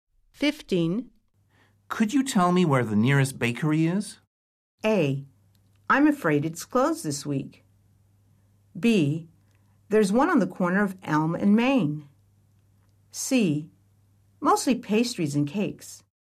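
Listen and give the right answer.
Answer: B: There's one on the corner of Elm and Main.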